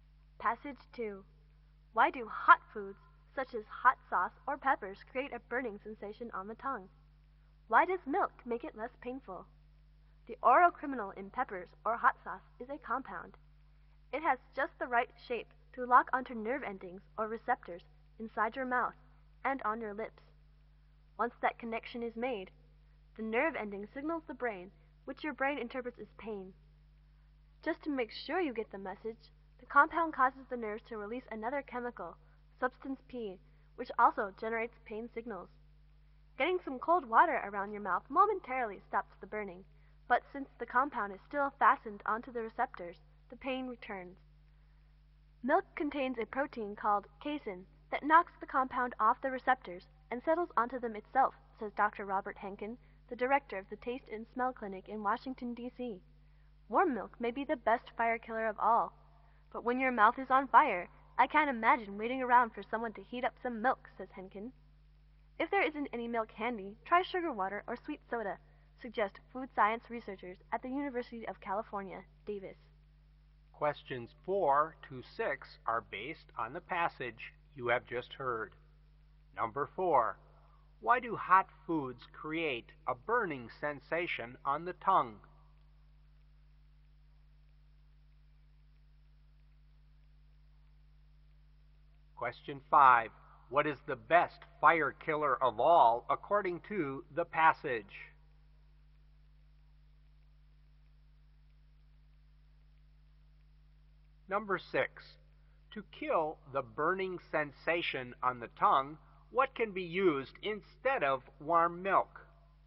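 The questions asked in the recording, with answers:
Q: Why do hot foods create a burning sensation on the tongue?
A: A compound locks onto nerve receptors in the mouth, which signal pain to the brain

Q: What is the best fire killer of all according to the passage?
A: Warm milk

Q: To kill the burning sensation on the tongue, what can be used instead of warm milk?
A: Sugar water or sweet soda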